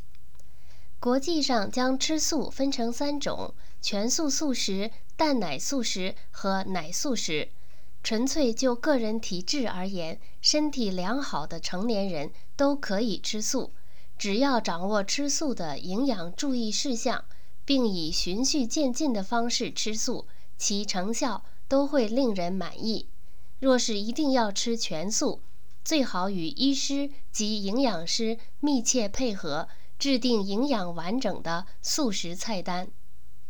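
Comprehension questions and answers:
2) 有哪些不同种类的吃素?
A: 全素素食、蛋奶素食和奶素食

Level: 3rd Year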